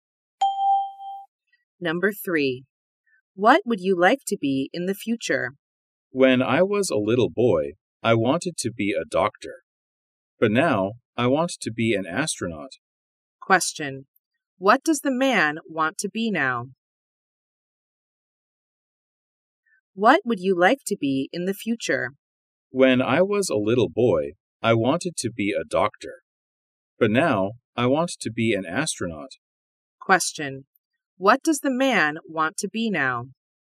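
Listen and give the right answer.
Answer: An astronaut.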